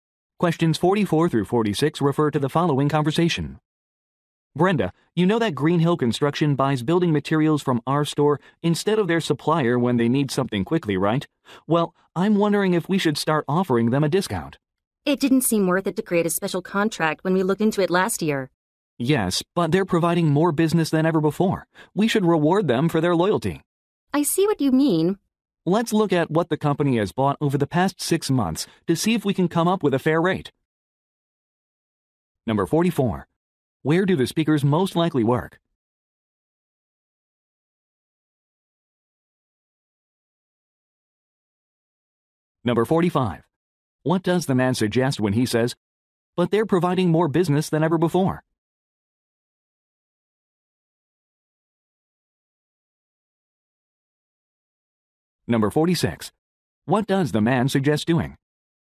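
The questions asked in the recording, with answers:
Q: Where do the speakers most likely work?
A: At a building materials store

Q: What does the man suggest when he says, "But they're providing more business than ever before"?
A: Offering a discount is now worthwhile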